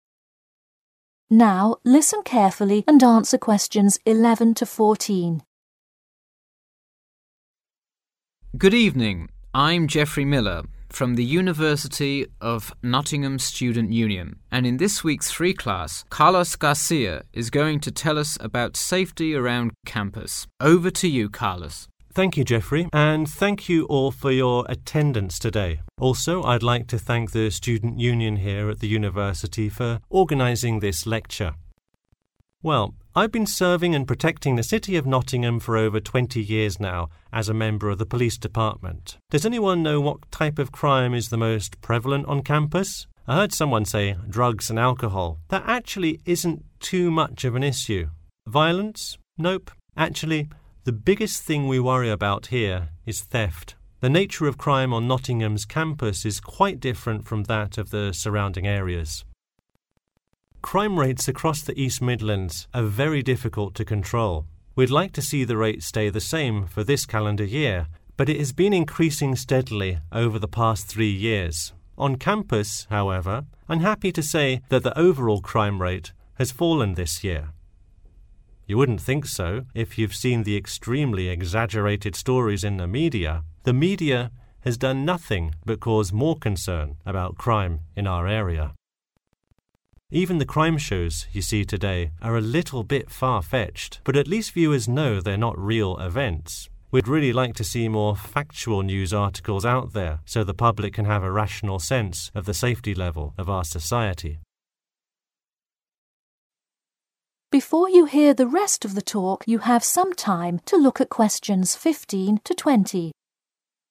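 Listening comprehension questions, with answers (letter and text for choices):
Questions 11-14. Choose a correct letter, A, B or C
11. The lecture was organised by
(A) City of Nottingham.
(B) University of Nottingham Students' Union.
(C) Nottingham Police Department.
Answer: (B) University of Nottingham Students' Union.

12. The majority of crime on campus is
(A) Drugs and Alcohol.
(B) Violence.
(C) Theft.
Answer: (C) Theft.

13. The campus crime rate has............so far this year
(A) increased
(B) decreased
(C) stayed the same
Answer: (B) decreased

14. Why is there added concern about crime?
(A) exaggeration in media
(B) crime TV shows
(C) factual news articles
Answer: (A) exaggeration in media

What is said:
GEOFFREY: Good evening, I'm Geoffrey Miller, from the University of Nottingham Student Union. And in this week's free class, Carlos Garcia is going to tell us about 1 around campus. 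Over to you, Carlos.
CARLOS: Thank you, Geoffrey. And thank you for all of your 2 today. Also, I would like to thank the student union here at the university for organising this lecture.
Well, I have been serving and 3 the city of Nottingham for over 20 years now as a member of the police 4 . Does anyone know what type of crime is the most 5 on campus? I heard someone say drugs and alcohol – that actually isn't too much of an issue. Nope. Actually, the biggest thing we worry about here is theft. The nature of crime on Nottingham's campus is quite different from that of the 6 areas.
Crime rates across the East Midlands are very difficult to control. We would like to see the rate stay the same for this 7 year, but it has been increasing 8 over the past three years. On campus, however, I'm happy to say that the overall crime rate has fallen this year. You wouldn't think so if you have seen the extremely 9 stories in the media. 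The media has done nothing but cause more concern about crime in our area.
Even the crime shows you see today are a little bit far-fetched, but at least 10 know they are not real events. We would really like to see more factual news articles out there so the public can have a 11 sense of the safety level of our society.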